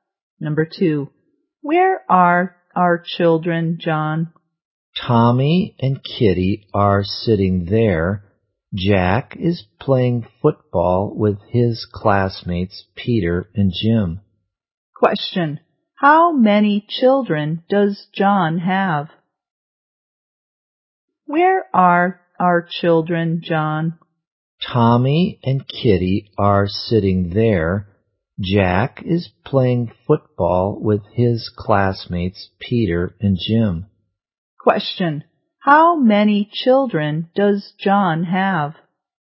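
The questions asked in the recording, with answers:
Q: How many children does John have?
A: Three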